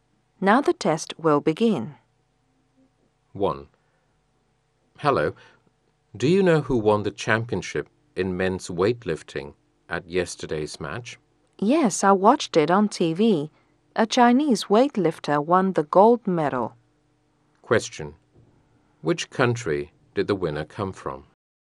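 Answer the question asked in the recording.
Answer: China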